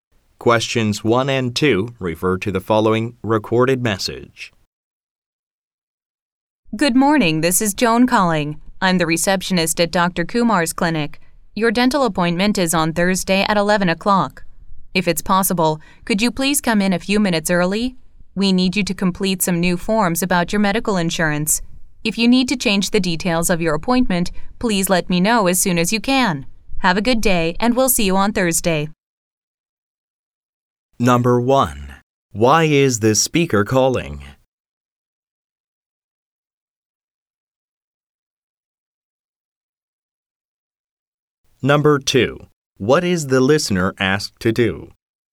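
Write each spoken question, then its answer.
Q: Why is this speaker calling?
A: To remind the listener about a dental appointment on Thursday at 11 o'clock

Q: What is the listener asked to do?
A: Come in a few minutes early to complete new medical insurance forms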